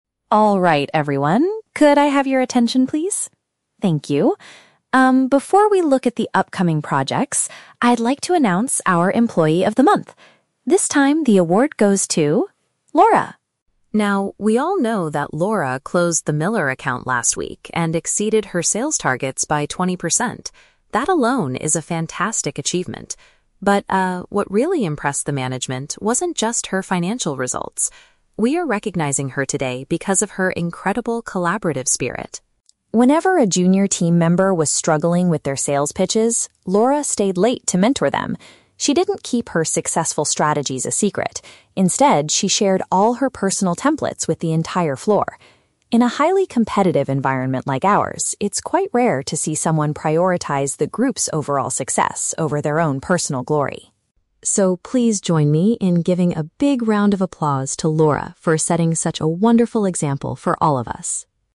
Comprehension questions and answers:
Listen to the manager's speech at a department meeting and choose the correct answer (A, B, or C).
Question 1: Why is Laura primarily receiving the award this month?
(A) She achieved the highest financial results in the company's history.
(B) She demonstrated a strong willingness to assist her coworkers.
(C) She successfully organized the monthly department meeting.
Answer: She demonstrated a strong willingness to assist her coworkers.

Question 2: How did Laura help the less experienced staff members?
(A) She gave them some of her clients so they could reach their goals.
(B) She bought new training materials for the whole department.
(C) She spent extra hours at work to guide them with their presentations.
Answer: She spent extra hours at work to guide them with their presentations.

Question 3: How does the manager describe their current workplace?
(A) It is a place where people focus heavily on outperforming each other.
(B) It is a relaxing office where employees rarely face any pressure.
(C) It is a secretive environment where nobody knows the business strategies.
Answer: It is a place where people focus heavily on outperforming each other.

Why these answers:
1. The manager states they are recognizing her because of her "incredible collaborative spirit" (willingness to assist coworkers). Why the trap is wrong: Option (A) is a trap. The audio mentions her "financial results" and exceeding targets, but the manager explicitly says the award "wasn't just her financial results." Plus, it doesn't mention "company's history." Option (C) is a plausible office task, but the manager is speaking at the meeting; Laura didn't organize it.
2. The script says Laura "stayed late" (spent extra hours) to "mentor them" (guide them) when they struggled with their "sales pitches" (presentations). Why the trap is wrong: Option (A) is a logical way to help, but it is never mentioned in the audio. Option (B) is a trap. The audio mentions "templates," but Laura "shared her personal templates," she did not "buy new training materials."
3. The manager describes the office as a "highly competitive environment." Option A is a perfect paraphrase of this concept (people trying to outperform or beat each other). Why the trap is wrong: Option (B) is the exact opposite of the audio. Option (C) is a trap because the word "secret" is mentioned, but the manager says Laura did not keep her strategies a secret.

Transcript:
Manager: Alright, everyone, could I have your attention, please? Thank you. Um, before we look at the upcoming projects, I'd like to announce our Employee of the Month. This time, the award goes to... Laura!
Now, we all know that Laura closed the Miller account last week and exceeded her sales targets by twenty percent. That alone is a fantastic achievement. But, uh, what really impressed the management wasn't just her financial results. We are recognizing her today because of her incredible collaborative spirit.
Whenever a junior team member was struggling with their sales pitches, Laura stayed late to mentor them. She didn't keep her successful strategies a secret; instead, she shared all her personal templates with the entire floor. In a highly competitive environment like ours, it's quite rare to see someone prioritize the group's overall success over their own personal glory.
So, please join me in giving a big round of applause to Laura for setting such a wonderful example for all of us!

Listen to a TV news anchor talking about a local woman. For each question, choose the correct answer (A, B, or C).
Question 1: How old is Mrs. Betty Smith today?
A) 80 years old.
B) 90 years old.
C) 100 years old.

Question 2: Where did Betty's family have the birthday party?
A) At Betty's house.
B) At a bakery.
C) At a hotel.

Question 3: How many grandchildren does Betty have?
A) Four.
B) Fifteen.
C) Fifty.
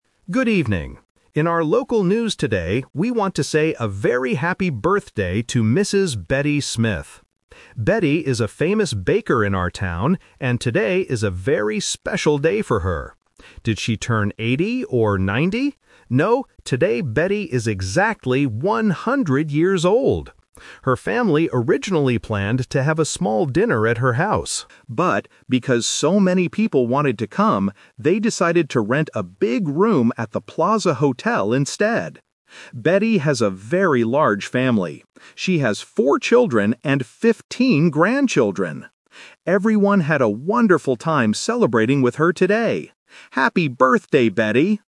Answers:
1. 100 years old.
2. At a hotel.
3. Fifteen.

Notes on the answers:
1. The news anchor asks, "Did she turn 80 or 90?" (Options A and B - Traps), and then answers, "No, today Betty is exactly 100 years old!" (Option C - Key).
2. The anchor says the family "originally planned to have a small dinner at her house" (Option A - Trap). However, they changed their minds and decided to "rent a big room at the Plaza Hotel instead" (Option C - Key). Option B is a trap because the anchor mentions Betty is a "famous baker," but the party was not at a bakery.
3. The anchor clearly states that Betty has "fifteen grandchildren" (Option B - Key). Option A is a trap because "four" is the number of children she has, not grandchildren. Option C (Fifty) is a phonetic trap (fifteen vs. fifty) which is very common in A2 listening tests.

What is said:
News Anchor: Good evening. In our local news today, we want to say a very happy birthday to Mrs. Betty Smith. Betty is a famous baker in our town, and today is a very special day for her. Did she turn 80 or 90? No, today Betty is exactly 100 years old! Her family originally planned to have a small dinner at her house. But, because so many people wanted to come, they decided to rent a big room at the Plaza Hotel instead. Betty has a very large family. She has four children and fifteen grandchildren! Everyone had a wonderful time celebrating with her today. Happy birthday, Betty!

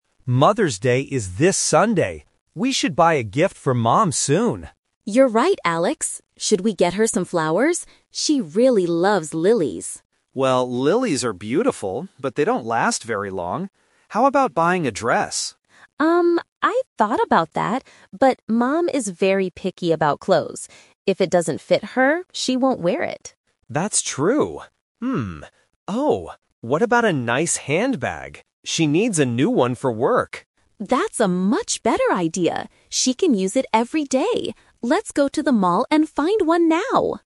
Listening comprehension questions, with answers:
Listen to the conversation and choose the correct answer (A, B, or C).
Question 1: What was Emma's first suggestion for a gift?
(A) A new dress.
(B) Some flowers.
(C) A handbag.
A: Some flowers.

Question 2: Why did they decide NOT to buy a dress?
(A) Because it is too expensive.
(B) Because they don't have enough time.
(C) Because Mom is difficult about choosing clothes.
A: Because Mom is difficult about choosing clothes.

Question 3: What gift are they going to buy at the mall?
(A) A handbag.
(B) Some lilies.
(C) A cookbook.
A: A handbag.

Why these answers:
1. Emma asks, "Should we get her some flowers?" at the beginning. Option A (Dress) was Alex's suggestion, and Option C (Handbag) was the final decision.
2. Emma says Mom is "very picky about clothes" (picky = difficult to please/khó tính trong việc chọn lựa). Option A and B are not mentioned in the script.
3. After rejecting the flowers and the dress, they agree on a handbag because "she needs a new one for work." This is the Final Result of the conversation.

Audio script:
Alex: Mother's Day is this Sunday. We should buy a gift for Mom soon.
Emma: You're right, Alex. Should we get her some flowers? She really loves lilies.
Alex: Well, lilies are beautiful, but they don't last very long. How about buying a dress?
Emma: Um, I thought about that, but Mom is very picky about clothes. If it doesn't fit her, she won't wear it.
Alex: That's true. oh! What about a nice handbag? She needs a new one for work.
Emma: That's a much better idea! She can use it every day. Let's go to the mall and find one now.

